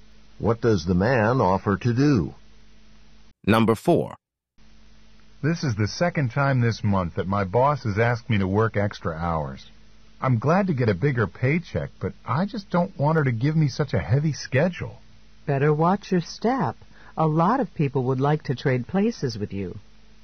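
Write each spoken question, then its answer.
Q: What does the woman imply the man should do?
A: Stop complaining and be glad he has the job.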